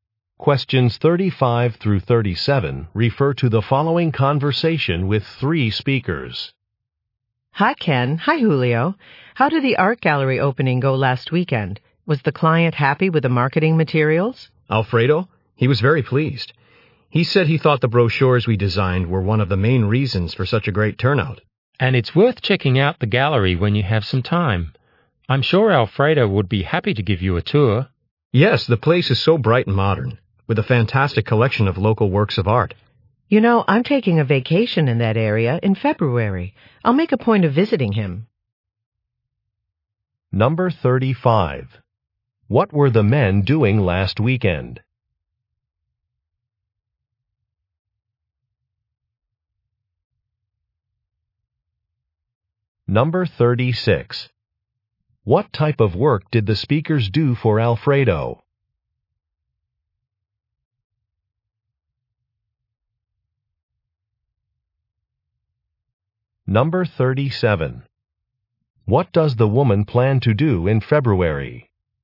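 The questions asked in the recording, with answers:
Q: What were the men doing last weekend?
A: Attending an art gallery opening

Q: What type of work did the speakers do for Alfredo?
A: Designed marketing brochures

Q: What does the woman plan to do in February?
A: Take a vacation and visit the gallery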